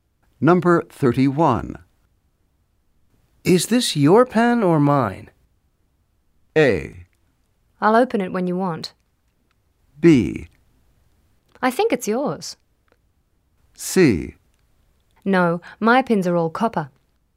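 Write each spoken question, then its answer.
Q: Is this your pen or mine?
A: B: I think it's yours.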